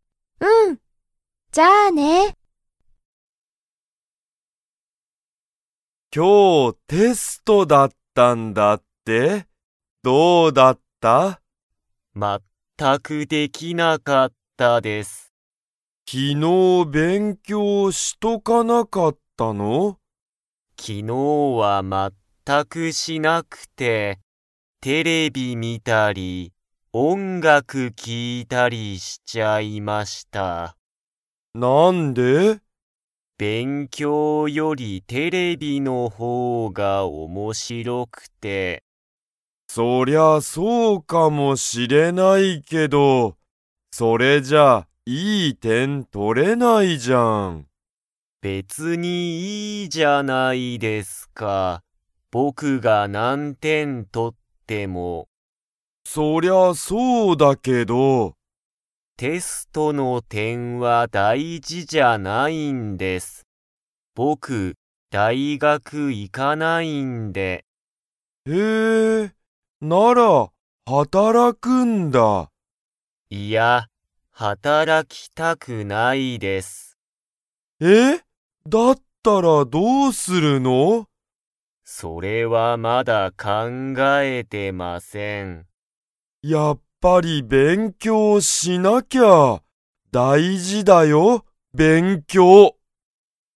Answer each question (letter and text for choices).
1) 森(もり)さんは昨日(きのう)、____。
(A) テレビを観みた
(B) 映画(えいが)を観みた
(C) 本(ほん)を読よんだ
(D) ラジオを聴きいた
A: (A) テレビを観みた

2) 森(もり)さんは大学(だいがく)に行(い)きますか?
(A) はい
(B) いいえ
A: (B) いいえ

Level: Level 2